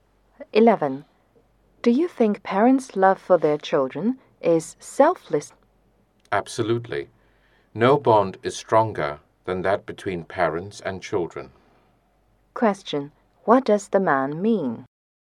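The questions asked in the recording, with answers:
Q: What does the man mean?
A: Parents' love for their children is selfless; no bond is stronger.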